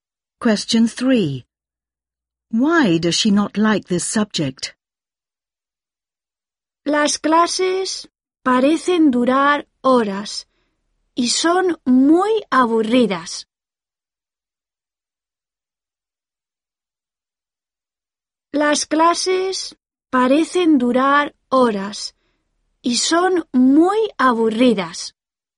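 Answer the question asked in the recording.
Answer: Lessons seem to last hours and are very boring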